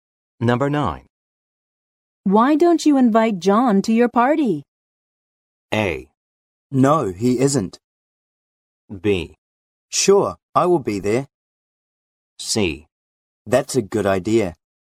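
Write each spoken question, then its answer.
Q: Why don't you invite John to your party?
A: C: That's a good idea.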